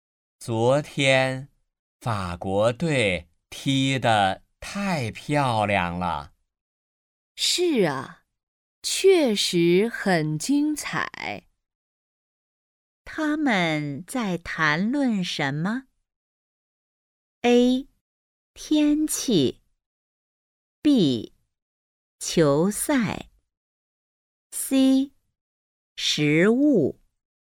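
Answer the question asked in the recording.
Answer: B: 球赛。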